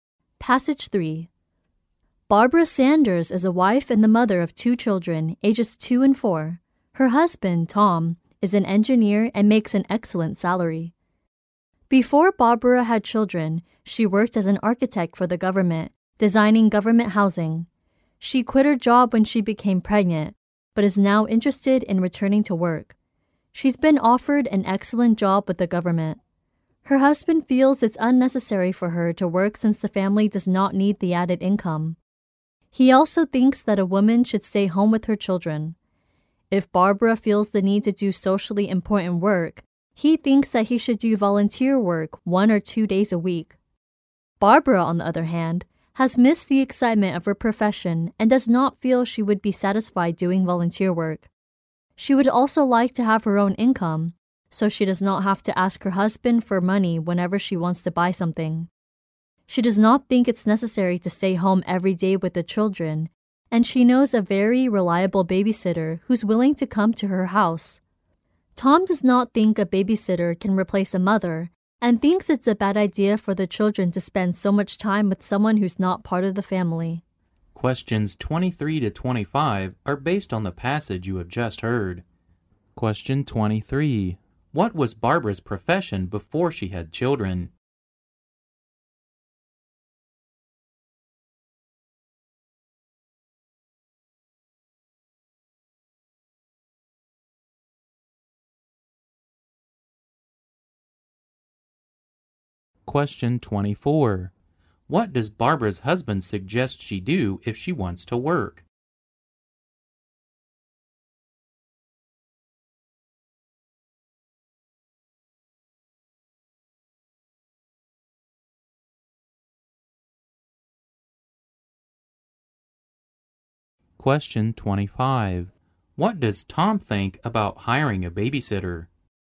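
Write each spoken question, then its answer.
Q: What was Barbara's profession before she had children?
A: An architect for the government.

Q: What does Barbara's husband suggest she do if she wants to work?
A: Do volunteer work one or two days a week.

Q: What does Tom think about hiring a babysitter?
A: A babysitter can't replace a mother; it's bad for the children.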